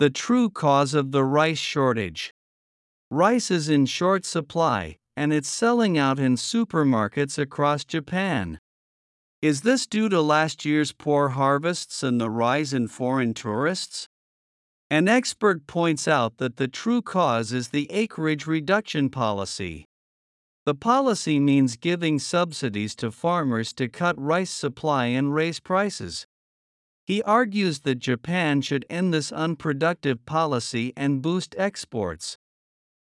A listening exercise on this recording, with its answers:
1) Rice is in short supply, and it's ( ).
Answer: selling out in supermarkets across Japan

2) Is this due to last year's ( )?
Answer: poor harvests and the rise in foreign tourists

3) ( ) is the acreage reduction policy.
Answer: An expert points out that the true cause

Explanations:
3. 英語ニュースの冒頭で「And」を接続詞として使うのは、一般的には不自然です。 また、「An expert」と「And an expert」はリンキングのシラブル数が異なり、「And」を入れると母音(赤文字)が1つ増えるため聞こえ方が違います。

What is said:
The True Cause of the Rice Shortage
Rice is in short supply, and it's selling out in supermarkets across Japan.
Is this due to last year's poor harvests and the rise in foreign tourists?
An expert points out that the true cause is the acreage reduction policy.
The policy means giving subsidies to farmers to cut rice supply and raise prices.
He argues that Japan should end this unproductive policy and boost exports.

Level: 中級